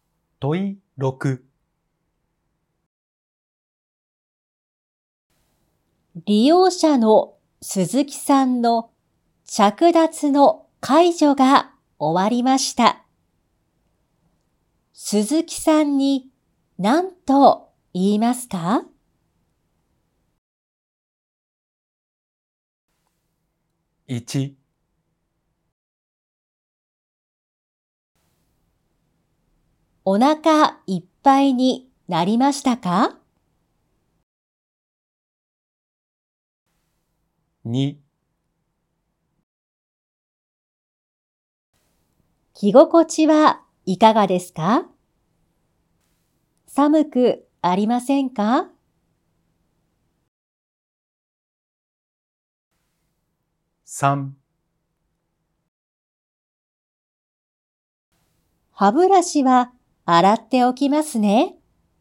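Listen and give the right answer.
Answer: 2: 着心地はいかがですか?寒くありませんか?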